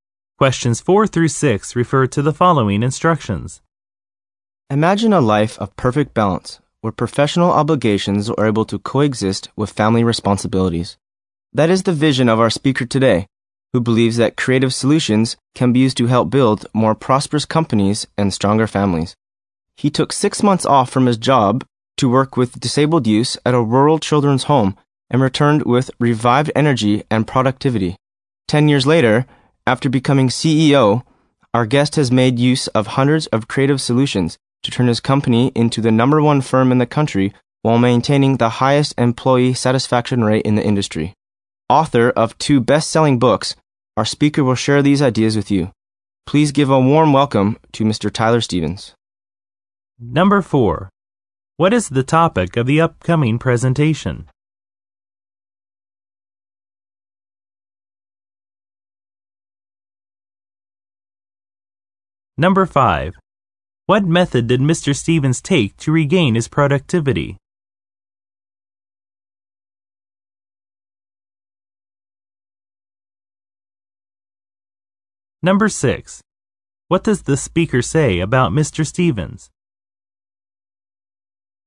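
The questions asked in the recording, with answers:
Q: What is the topic of the upcoming presentation?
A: Balancing work and family life through creative solutions

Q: What method did Mr. Stevens take to regain his productivity?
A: He took 6 months off to work with disabled youth at a rural children's home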